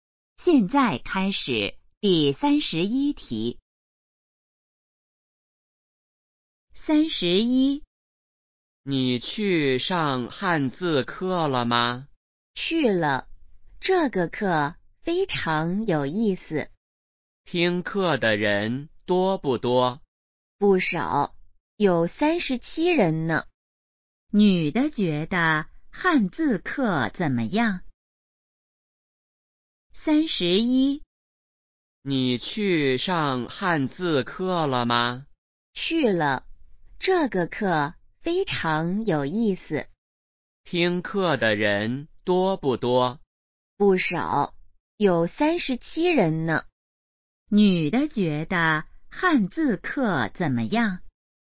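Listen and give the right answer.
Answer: 非常有意思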